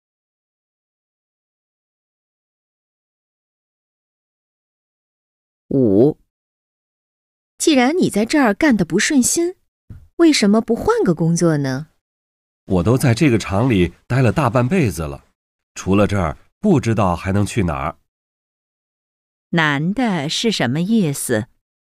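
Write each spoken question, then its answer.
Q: 男的是什么意思?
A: 除了这个厂不知道还能去哪儿,不想换工作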